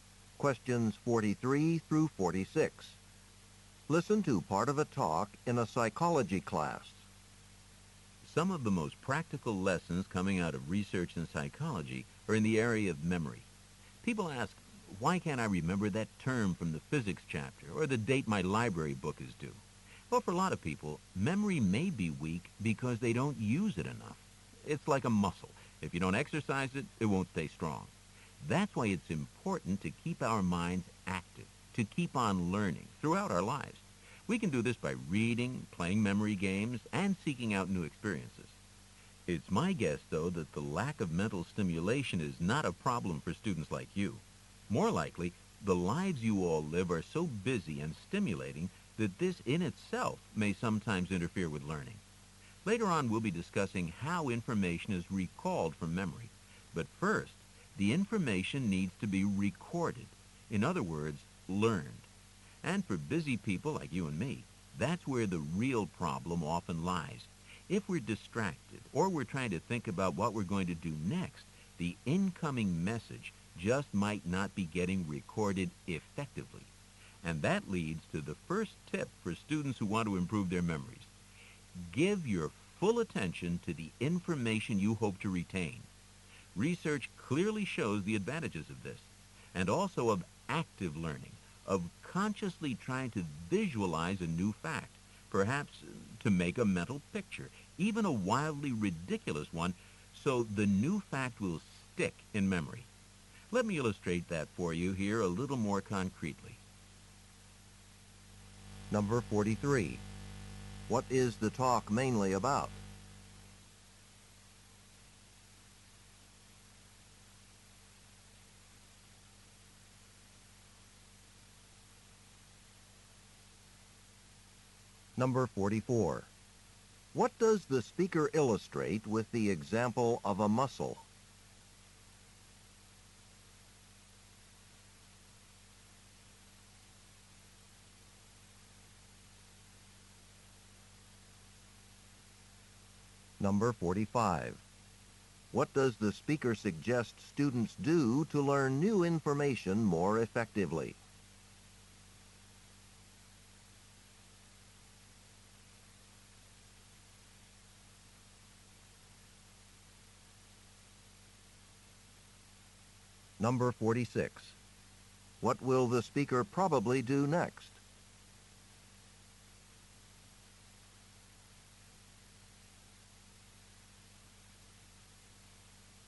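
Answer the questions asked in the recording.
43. How to improve memory
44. Memory weakens if it is not used
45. Give it full attention and visualize it
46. Give a concrete example of visualizing a fact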